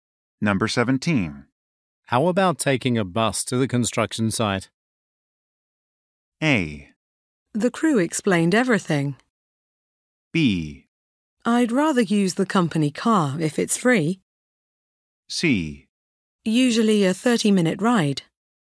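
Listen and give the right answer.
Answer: B: I'd rather use the company car if it's free.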